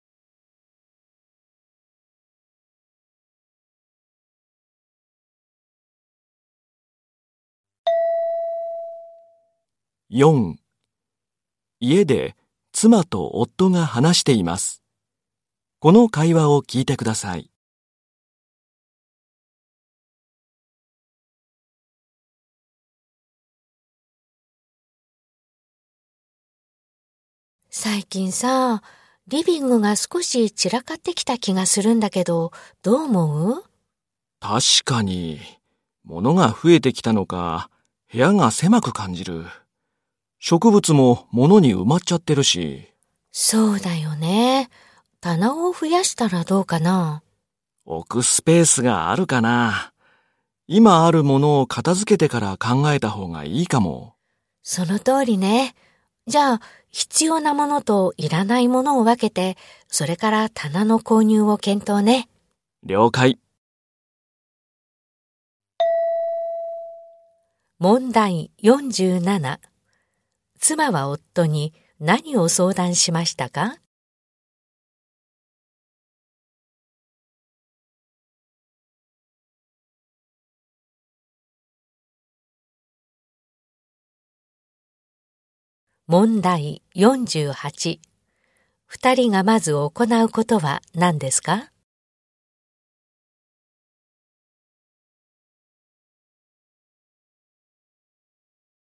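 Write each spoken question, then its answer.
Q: 妻は夫に何を相談しましたか?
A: リビングが散らかってきたこと

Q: 二人がまず行うことは何ですか?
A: 必要なものといらないものを分ける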